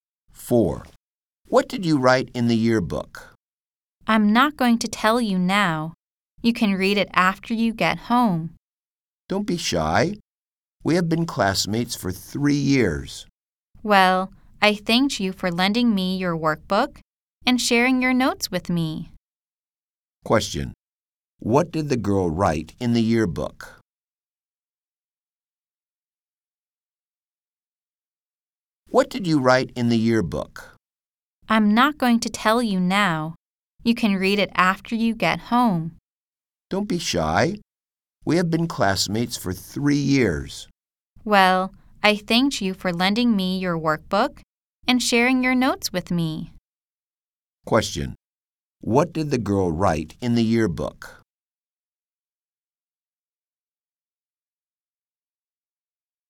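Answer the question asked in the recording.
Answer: She thanked him for lending her his workbook and sharing his notes.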